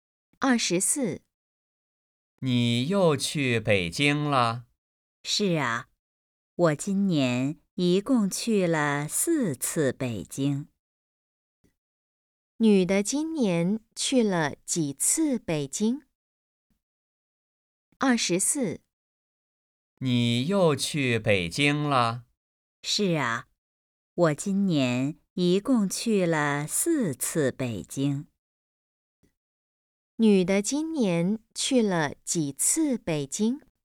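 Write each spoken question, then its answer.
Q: 女的今年去了几次北京?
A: 四次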